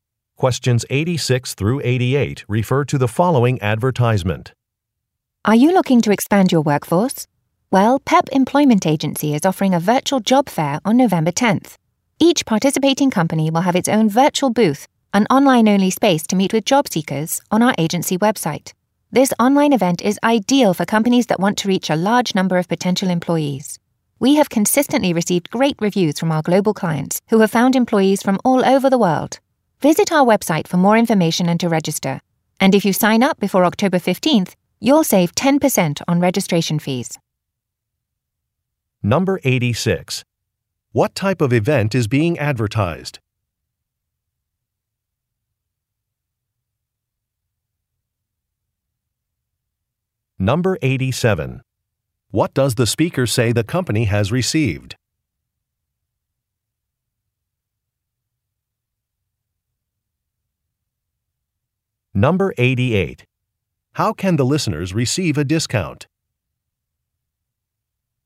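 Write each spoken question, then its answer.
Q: What type of event is being advertised?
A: A virtual job fair

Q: What does the speaker say the company has received?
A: Great reviews from global clients

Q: How can the listeners receive a discount?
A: Register before October 15th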